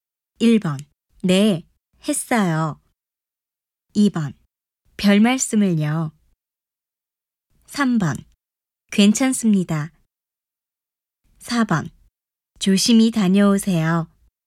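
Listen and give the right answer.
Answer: 1: 네, 했어요.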